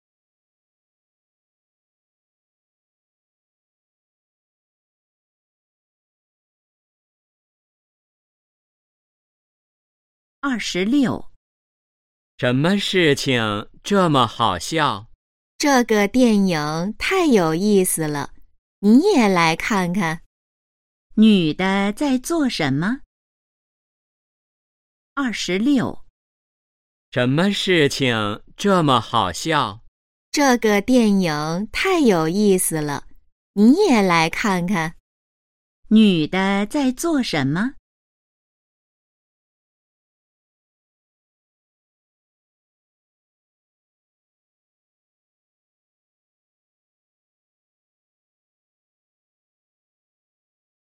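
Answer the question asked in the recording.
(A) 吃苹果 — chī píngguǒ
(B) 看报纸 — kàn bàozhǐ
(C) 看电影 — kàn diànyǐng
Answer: (C) 看电影 — kàn diànyǐng

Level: HSK2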